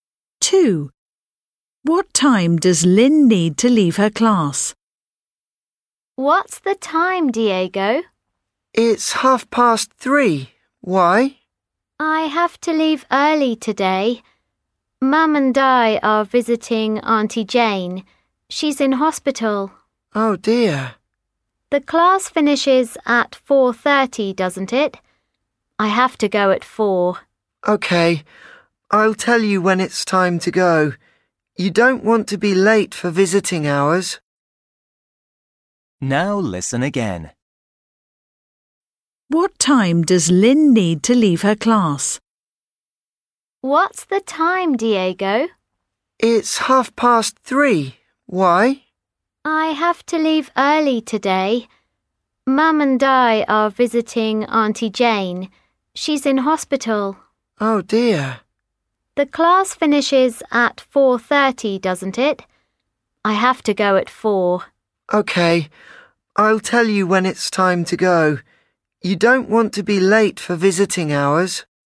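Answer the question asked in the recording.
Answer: At 4 o'clock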